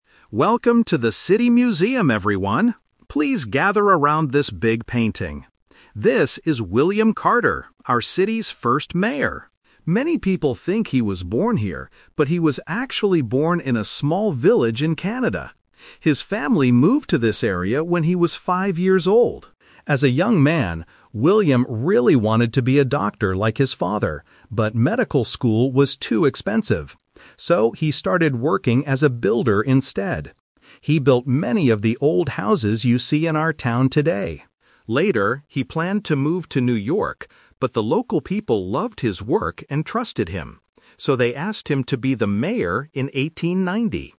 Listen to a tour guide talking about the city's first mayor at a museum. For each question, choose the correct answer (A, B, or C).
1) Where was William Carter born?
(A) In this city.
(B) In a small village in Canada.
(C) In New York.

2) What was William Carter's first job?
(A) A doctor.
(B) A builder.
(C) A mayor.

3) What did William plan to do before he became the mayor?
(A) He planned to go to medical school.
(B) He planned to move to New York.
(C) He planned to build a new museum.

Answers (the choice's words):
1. In a small village in Canada.
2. A builder.
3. He planned to move to New York.

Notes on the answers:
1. The tour guide says, "...but he was actually born in a small village in Canada." Why the traps are wrong: Option A is the "Twist Trap". The guide mentions that many people think he was born there, but he wasn't. Option C is a city he planned to move to later in life.
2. The guide explains his career path: "So, he started working as a builder instead." Why the traps are wrong: Option A is a "Twist Trap". He wanted to be a doctor, but it was too expensive. Option C is what he became much later (in 1890).
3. The guide says, "Later, he planned to move to New York, but..." Why the traps are wrong: Option A is a trap because he wanted to go to medical school when he was a young man, not right before becoming mayor. Option C is plausible contextually (they are in a museum), but it is not mentioned in the audio.

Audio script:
Tour Guide: Welcome to the City Museum, everyone. Please gather around this big painting. This is William Carter, our city's first mayor.
Many people think he was born here, but he was actually born in a small village in Canada. His family moved to this area when he was five years old.
As a young man, William really wanted to be a doctor like his father, but medical school was too expensive. So, he started working as a builder instead. He built many of the old houses you see in our town today.
Later, he planned to move to New York, but the local people loved his work and trusted him. So, they asked him to be the mayor in 1890.